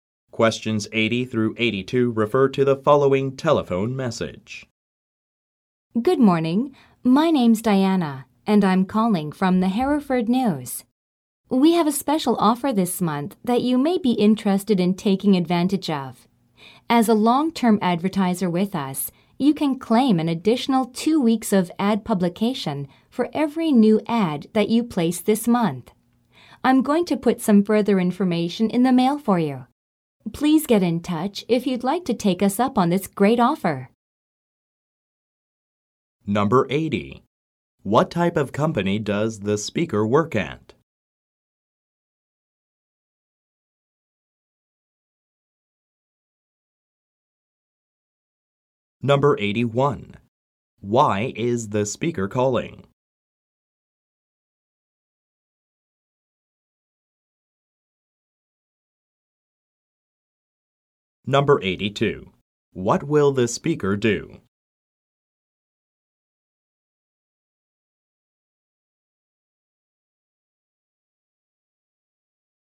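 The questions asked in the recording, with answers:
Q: What type of company does the speaker work at?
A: A newspaper (the Hereford News)

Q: Why is the speaker calling?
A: To tell the listener about a special advertising offer

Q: What will the speaker do?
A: Send more information by mail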